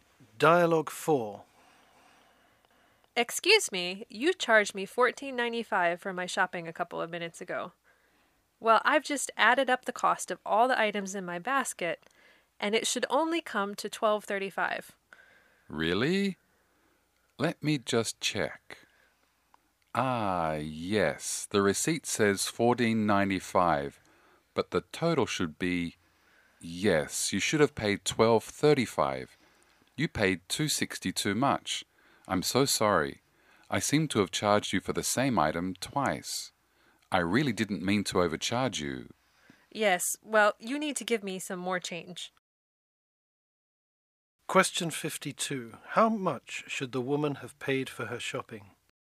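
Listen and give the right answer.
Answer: $12.35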